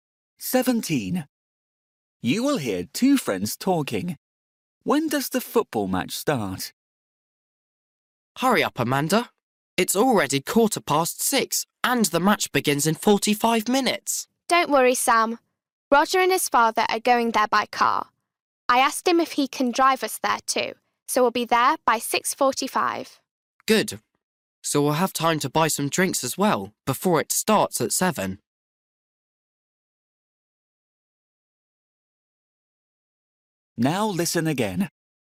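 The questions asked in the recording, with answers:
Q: When does the football match start?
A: At 7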